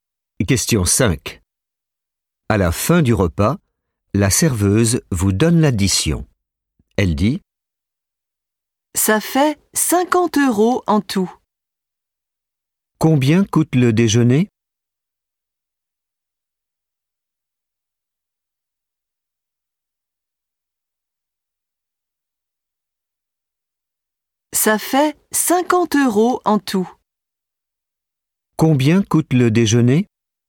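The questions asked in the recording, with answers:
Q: Combien coûte le déjeuner ?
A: 50 euros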